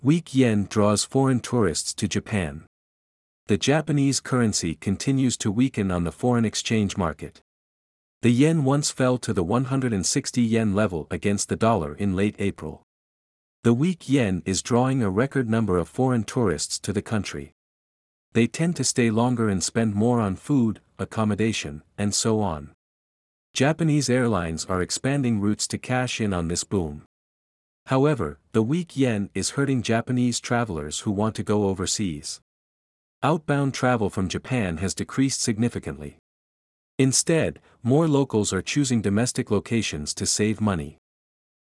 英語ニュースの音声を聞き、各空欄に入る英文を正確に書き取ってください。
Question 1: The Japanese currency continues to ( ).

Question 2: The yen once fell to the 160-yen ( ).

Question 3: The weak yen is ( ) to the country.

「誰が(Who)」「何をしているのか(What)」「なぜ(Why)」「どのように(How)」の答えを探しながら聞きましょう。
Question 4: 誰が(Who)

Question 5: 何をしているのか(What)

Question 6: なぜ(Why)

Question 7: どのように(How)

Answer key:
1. weaken on the foreign exchange market
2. level against the dollar in late April
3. drawing a record number of foreign tourists
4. 多くの外国人観光客が、(A lot of foreign tourists)
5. 日本を訪れている、(are visiting Japan, )
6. 円安のため。(< because of / due to> the weak yen. )
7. 彼らはより長く滞在し、お金を使う傾向がある。(They tend to stay longer and spend more.)

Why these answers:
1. weaken on」は子音+母音が連結するため「weekend」と音が似ていますが、「continues to(動詞+不定詞)」の直後なので「動詞の原形」が来ないと文法的に通りません。
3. draw(〜を引き付ける)」という他動詞の使い方に慣れておきましょう。これは「attract」に置き換え可能です。

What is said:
Weak Yen Draws Foreign Tourists to Japan
The Japanese currency continues to weaken on the foreign exchange market.
The yen once fell to the 160-yen level against the dollar in late April.
The weak yen is drawing a record number of foreign tourists to the country.
They tend to stay longer and spend more on food, accommodation, and so on.
Japanese airlines are expanding routes to cash in on this boom.
However, the weak yen is hurting Japanese travelers who want to go overseas.
Outbound travel from Japan has decreased significantly.
Instead, more locals are choosing domestic locations to save money.

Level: B1レベル